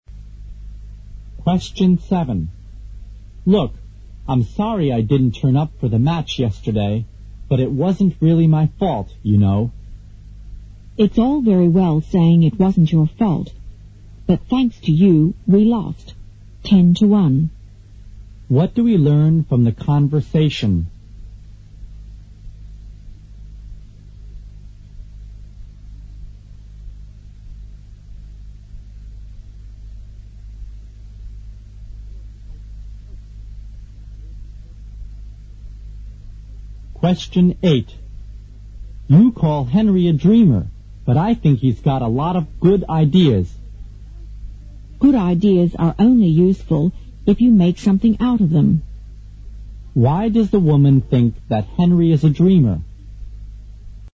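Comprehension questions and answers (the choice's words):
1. What do we learn from theconversation?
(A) The woman blames the man for his absence.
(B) The woman thinks that everything was all right.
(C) The woman thanks the man for his efforts.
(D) The woman doesn't think it was the man's fault.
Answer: The woman blames the man for his absence.

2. Why does the woman think that Henry isa dreamer?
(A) He has too many dreams.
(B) He likes to sleep.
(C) He doesn't put his ideas into practice.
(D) He doesn't have many good ideas.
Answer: He doesn't put his ideas into practice.

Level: 六级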